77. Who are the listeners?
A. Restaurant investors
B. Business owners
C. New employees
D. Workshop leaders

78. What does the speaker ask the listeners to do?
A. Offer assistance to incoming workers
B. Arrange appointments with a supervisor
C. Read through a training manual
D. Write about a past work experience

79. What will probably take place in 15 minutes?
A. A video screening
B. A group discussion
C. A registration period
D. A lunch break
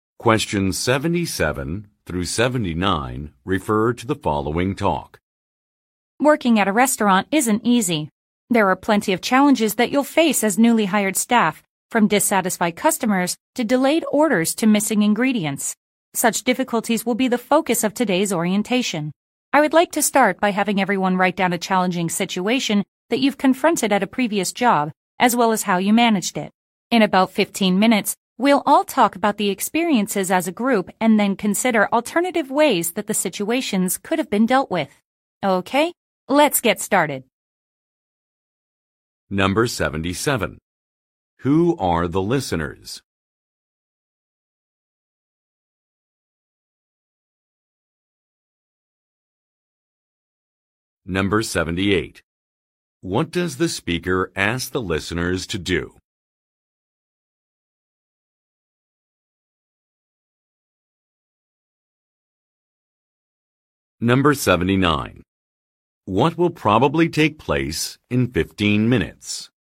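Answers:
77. C
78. D
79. B

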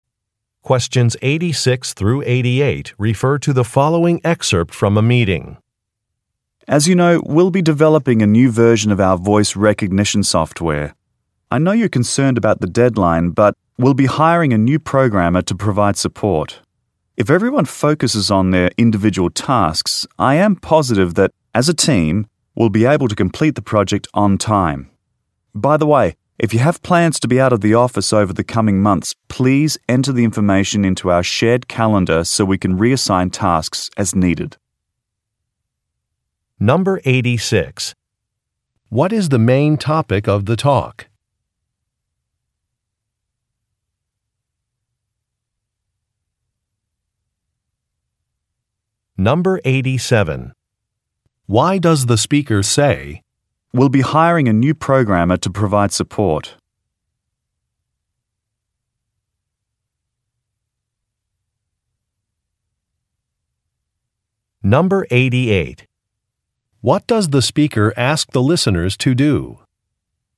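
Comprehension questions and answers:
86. What is the main topic of the talk?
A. A vacation policy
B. A new project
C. A revised budget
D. Some customer complaints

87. Why does the speaker say, "we'll be hiring a new programmer to provide support"?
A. To reassure the listeners regarding a timeline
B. To encourage the listeners to apply for a position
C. To respond to customer feedback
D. To suggest that more office space is needed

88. What does the speaker ask the listeners to do?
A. Change their passwords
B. Call Human Resources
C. Talk with Technical Support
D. Update a calendar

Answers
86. B
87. A
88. D

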